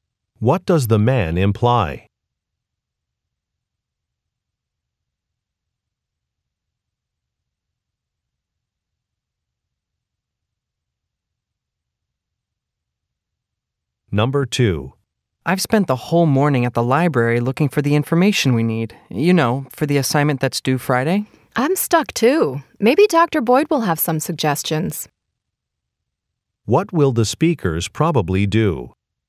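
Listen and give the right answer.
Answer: Ask Dr. Boyd for suggestions.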